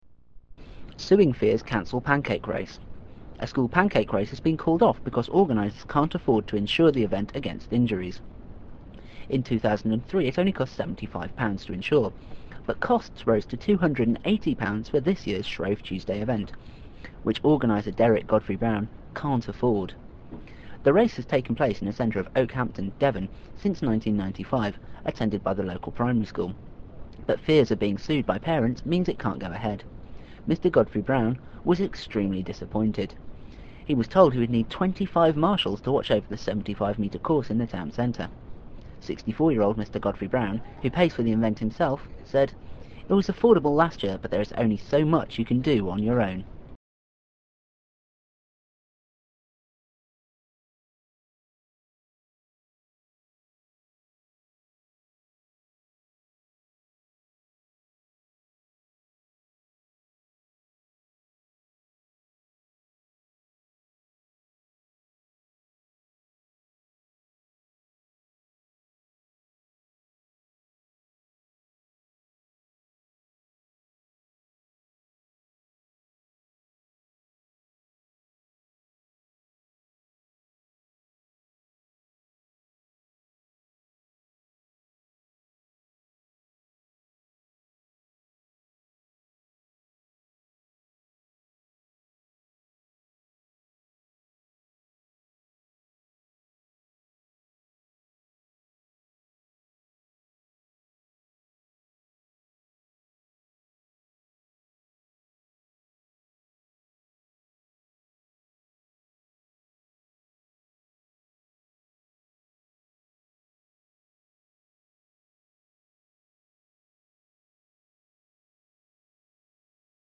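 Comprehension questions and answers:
Fill in all the gaps, then press "Check" to check your answers.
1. A school pancake race has been off because organisers can't afford to the event against .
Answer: called / insure / injuries

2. In 2003 it only cost £ to insure, but costs rose to £ for this year's event, which organiser Derek Godfrey-Brown can't afford.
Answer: 75 / 280 / Shrove Tuesday

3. The race has taken place in the centre of Okehampton, Devon, since 1995, attended by the local school. But fears of being by parents means it can't go ahead.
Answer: primary / sued

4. Mr Godfrey-Brown was " disappointed." He was told he would need 25 to watch over the 75 metre in the town Centre.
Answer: extremely / marshals / course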